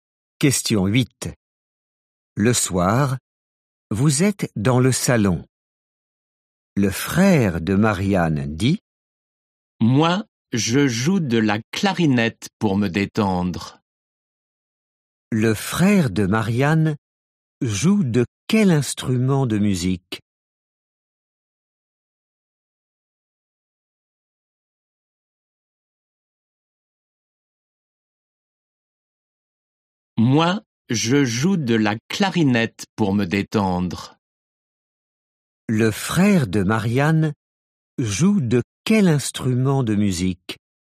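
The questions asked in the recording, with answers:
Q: Le frère de Marianne joue de quel instrument de musique?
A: De la clarinette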